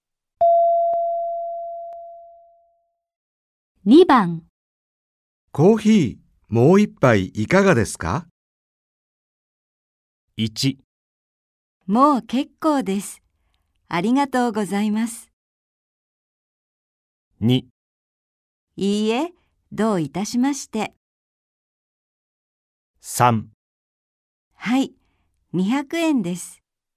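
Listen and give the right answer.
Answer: 1: もう結構です。ありがとうございます。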